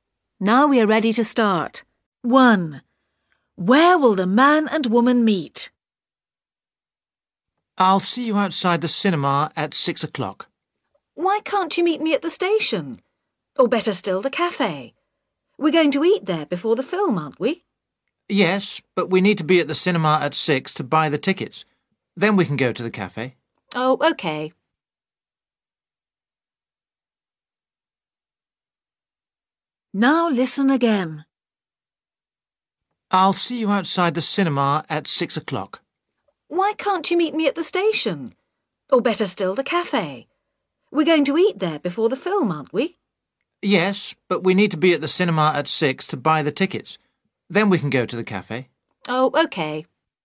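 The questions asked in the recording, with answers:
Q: Where will the man and woman meet?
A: outside the cinema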